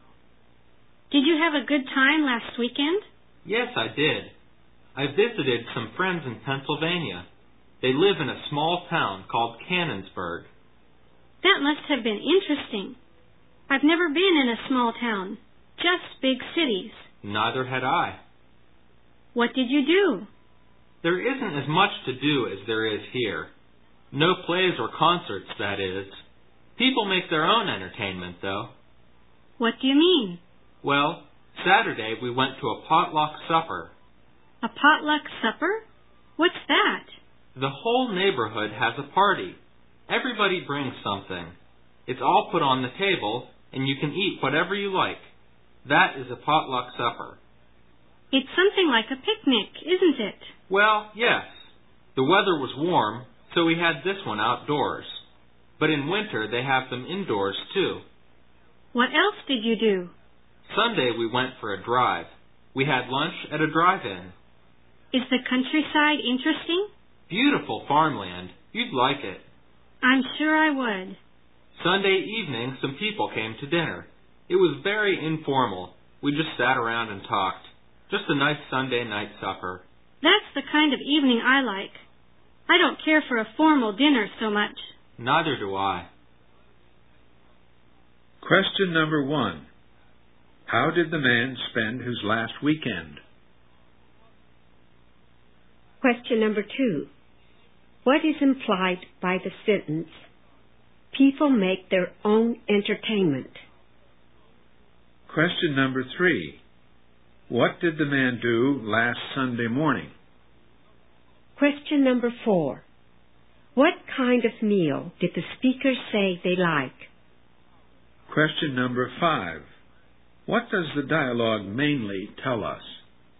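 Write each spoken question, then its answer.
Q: How did the man spend his last weekend?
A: He visited friends in a small town (Cannonsburg) in Pennsylvania

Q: What is implied by the sentence, "People make their own entertainment"?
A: There are no plays or concerts, so people entertain themselves

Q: What did the man do last Sunday morning?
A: He went for a drive

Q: What kind of meal did the speaker say they like?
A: An informal supper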